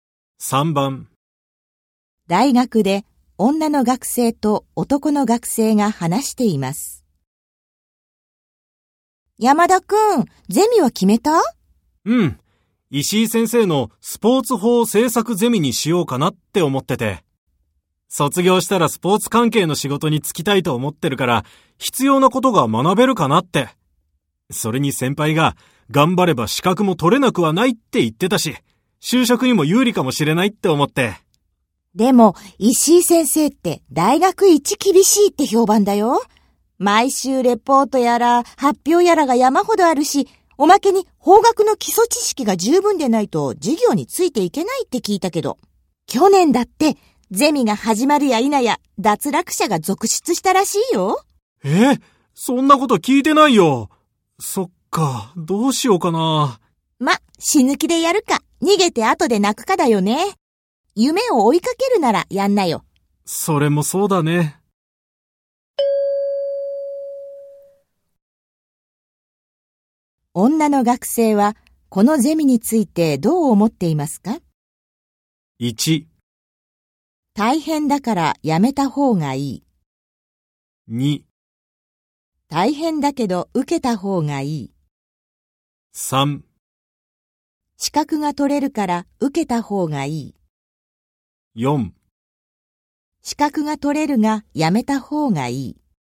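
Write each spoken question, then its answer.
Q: 女の学生はこのゼミについてどう思っていますか?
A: 2: 大変だけど受けた方がいい。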